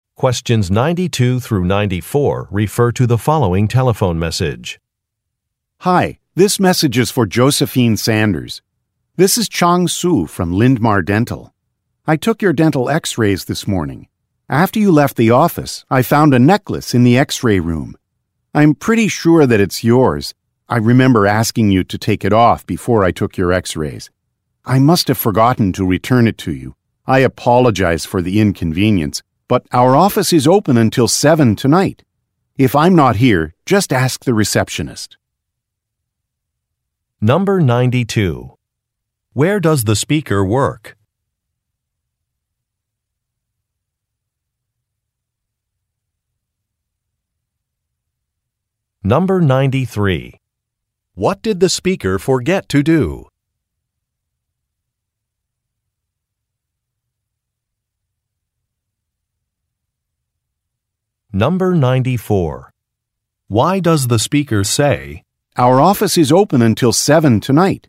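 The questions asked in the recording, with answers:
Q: Where does the speaker work?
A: At a dental office

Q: What did the speaker forget to do?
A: Return a necklace to the caller

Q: Why does the speaker say,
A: To suggest the listener can come pick up the necklace tonight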